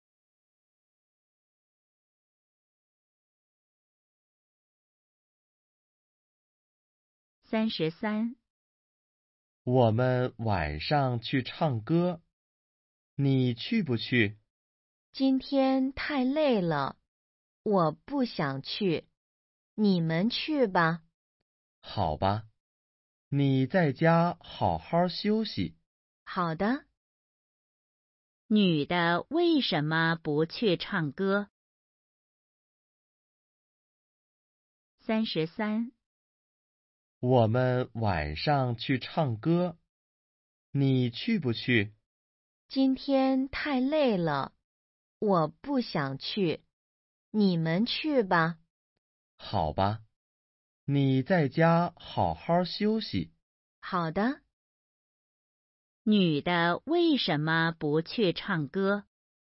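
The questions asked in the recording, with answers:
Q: 女的为什么不去唱歌?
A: 太累了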